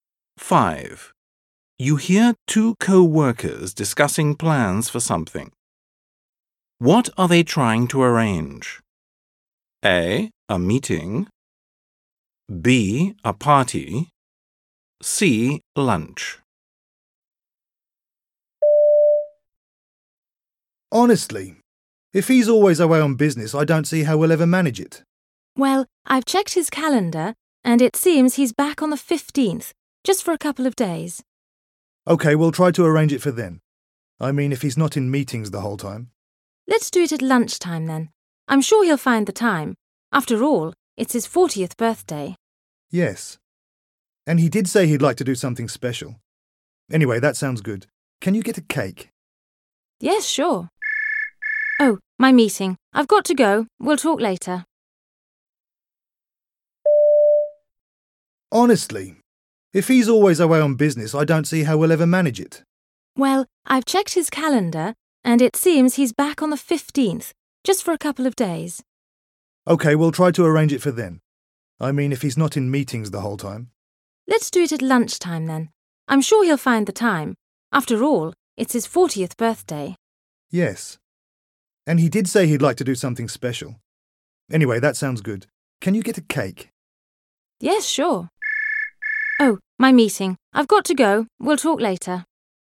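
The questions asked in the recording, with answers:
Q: What are they trying to arrange? A. A meeting. B. A party. C. Lunch.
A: B: A party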